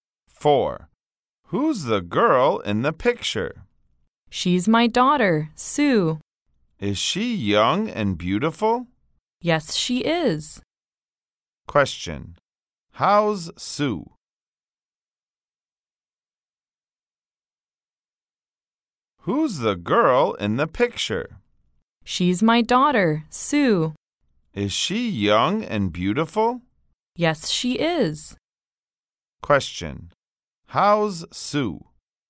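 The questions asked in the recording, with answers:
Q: How's Sue?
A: Young and beautiful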